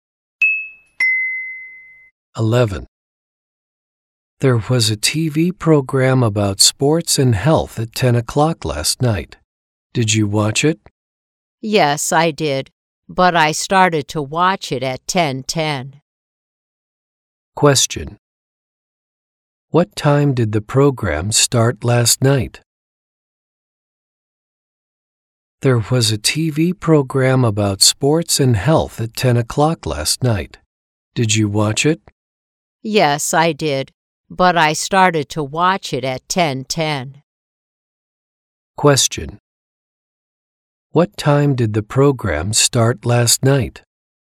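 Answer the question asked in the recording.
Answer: At 10 o'clock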